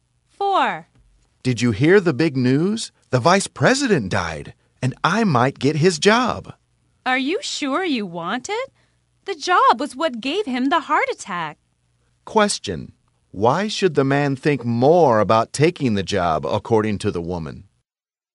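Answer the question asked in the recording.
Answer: The job gave the vice president a heart attack.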